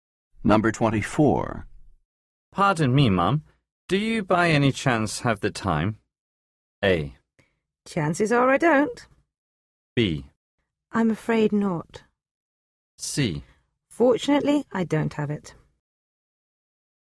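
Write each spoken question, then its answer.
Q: Pardon me, Mum. Do you by any chance have the time?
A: B: I'm afraid not.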